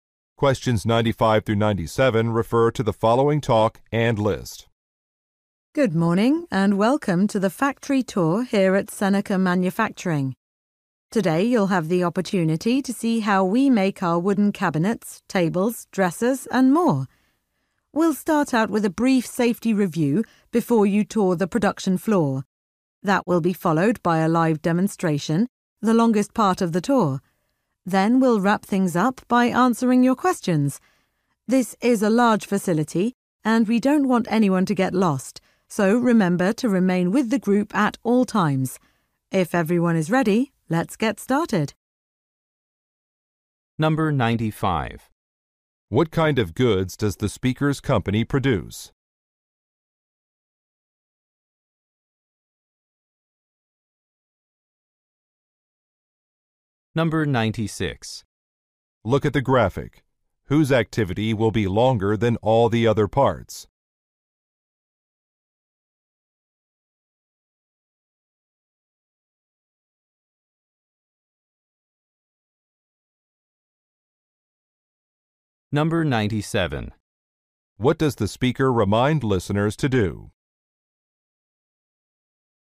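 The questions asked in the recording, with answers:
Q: What kind of goods does the speaker's company produce?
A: Wooden furniture

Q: What does the speaker remind listeners to do?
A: Stay with the group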